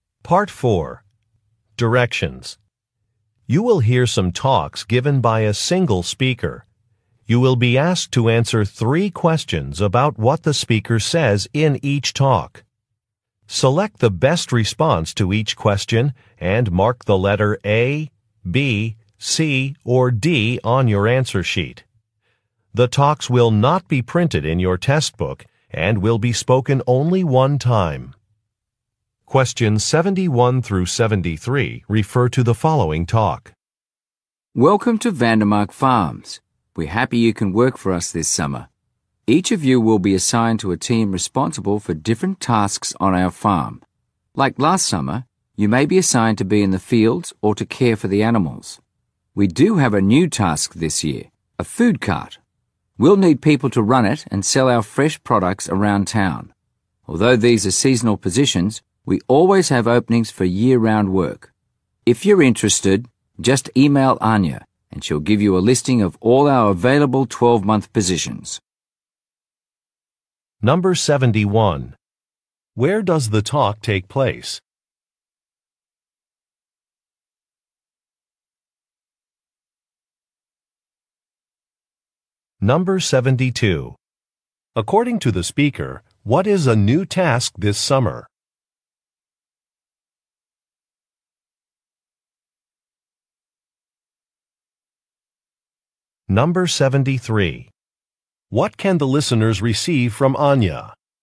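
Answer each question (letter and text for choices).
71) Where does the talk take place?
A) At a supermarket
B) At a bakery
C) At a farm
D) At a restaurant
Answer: C) At a farm

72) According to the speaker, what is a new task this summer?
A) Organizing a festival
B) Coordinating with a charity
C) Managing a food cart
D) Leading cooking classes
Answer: C) Managing a food cart

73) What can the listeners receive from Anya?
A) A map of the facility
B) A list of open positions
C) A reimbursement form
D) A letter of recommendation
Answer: B) A list of open positions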